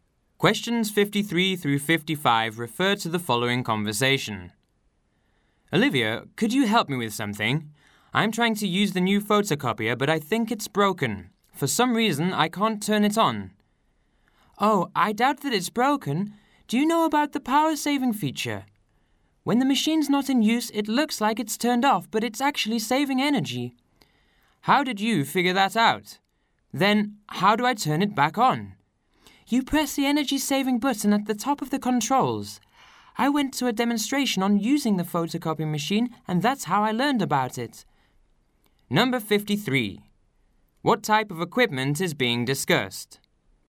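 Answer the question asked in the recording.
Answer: A photocopier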